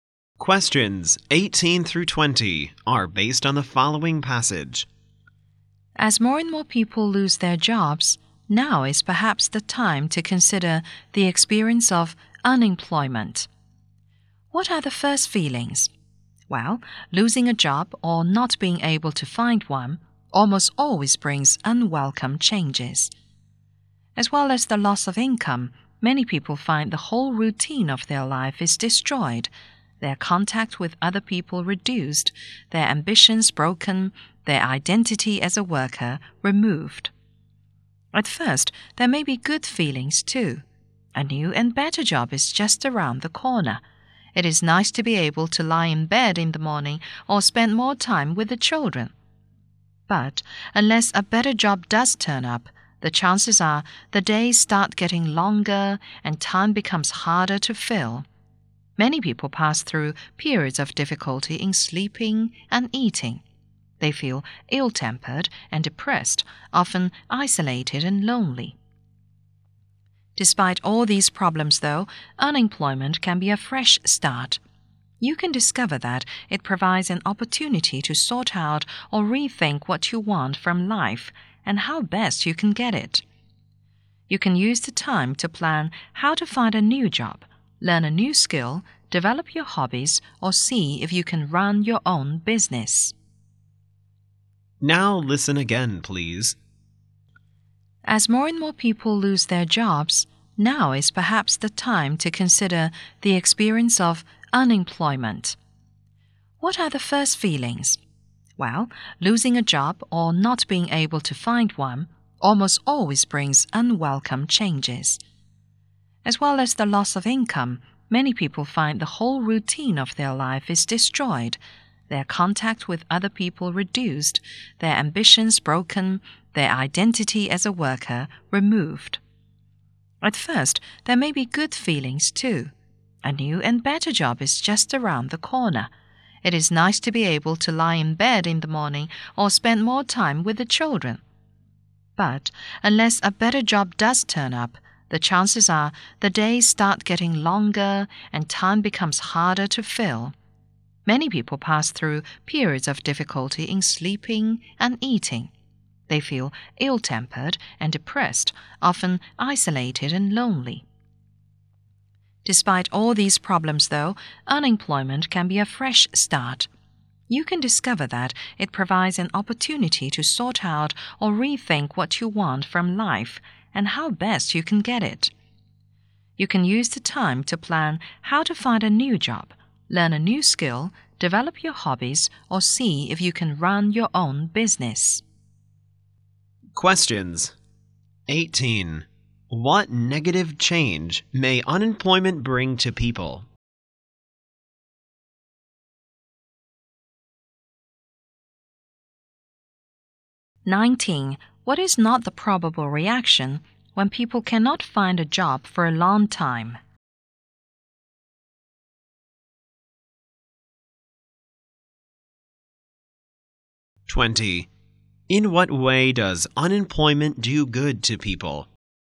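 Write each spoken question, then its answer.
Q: In what way does unemployment do good to people?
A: It gives a chance to rethink what they want from life and start fresh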